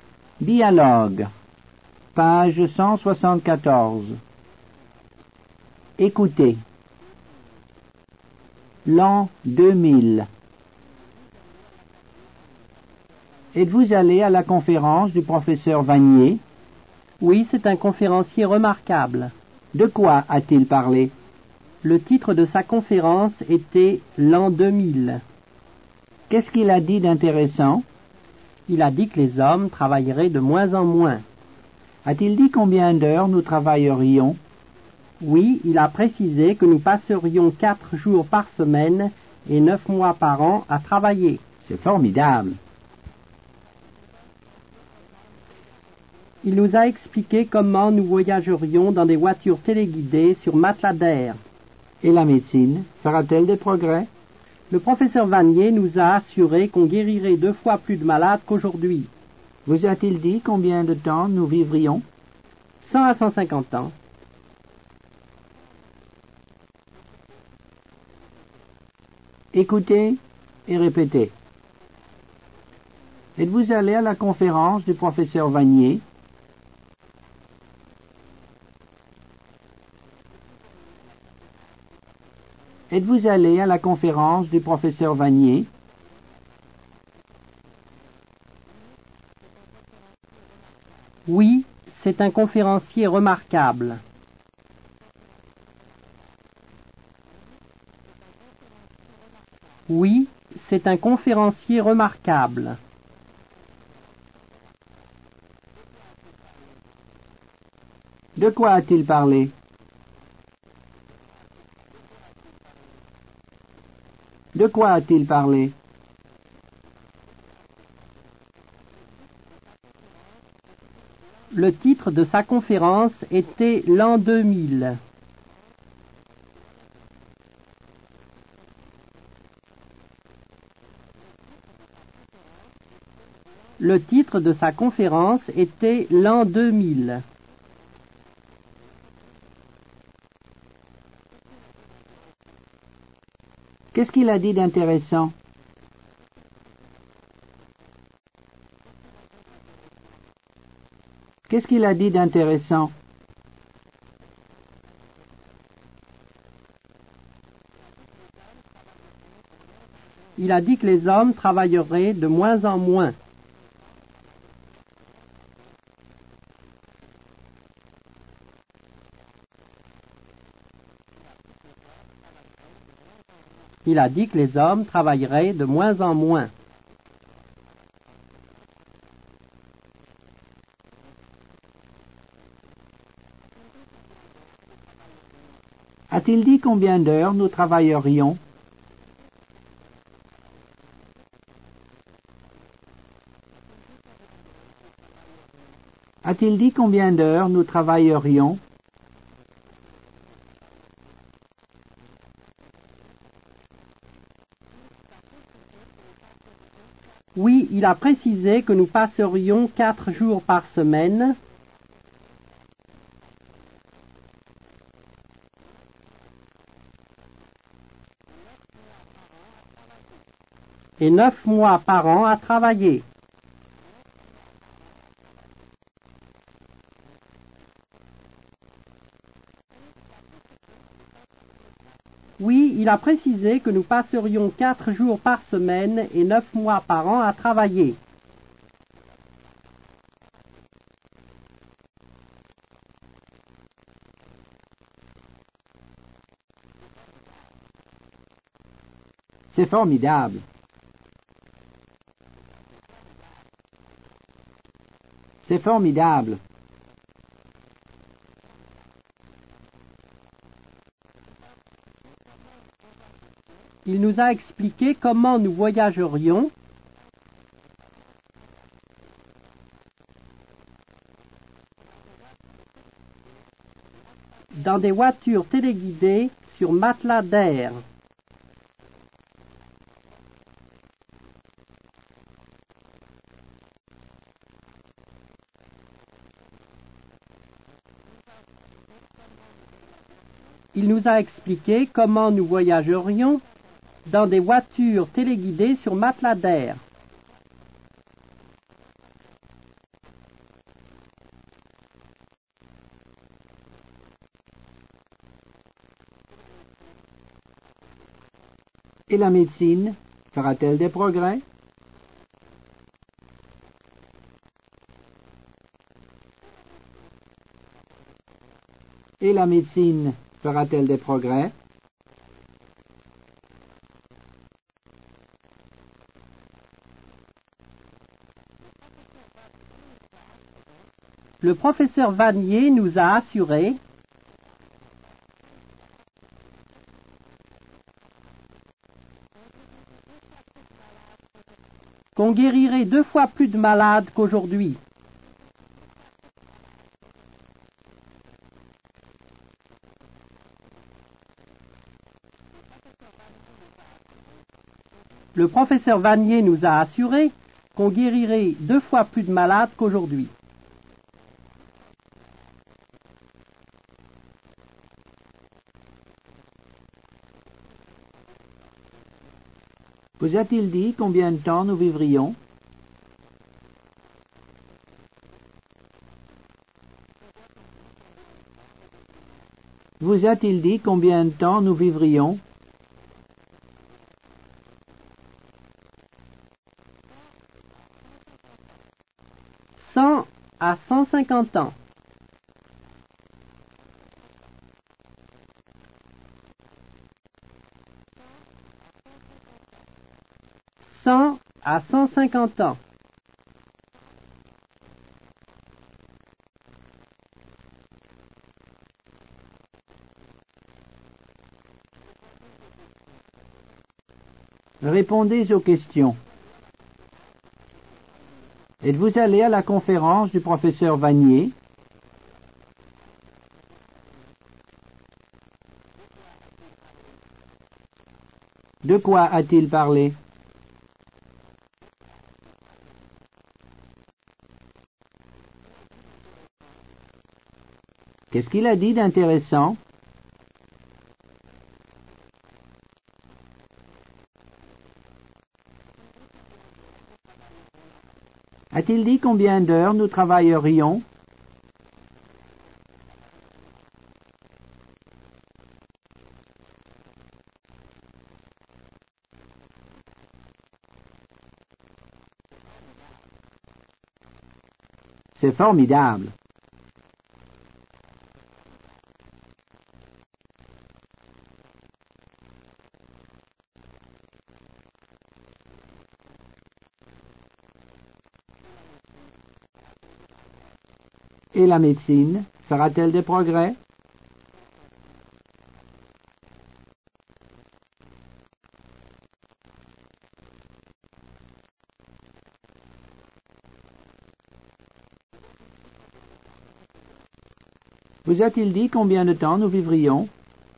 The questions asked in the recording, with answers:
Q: Êtes-vous allé à la conférence du professeur Vanier?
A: Oui, c'est un conférencier remarquable.

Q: De quoi a-t-il parlé?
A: Le titre de sa conférence était l'an 2000.

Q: Qu'est-ce qu'il a dit d'intéressant?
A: Il a dit que les hommes travailleraient de moins en moins.

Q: A-t-il dit combien d'heures nous travaillerions?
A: Oui, il a précisé que nous passerions 4 jours par semaine et 9 mois par an à travailler.

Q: Et la médecine fera-t-elle des progrès?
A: Le professeur Vanier nous a assuré qu'on guérirait 2 fois plus de malades qu'aujourd'hui.

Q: Vous a-t-il dit combien de temps nous vivrions?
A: À 150 ans.